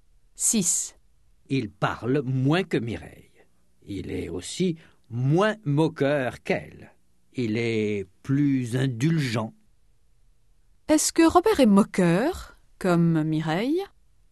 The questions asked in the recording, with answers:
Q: Est-ce que Robert est moqueur, comme Mireille?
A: Non. Il est moins moqueur qu'elle.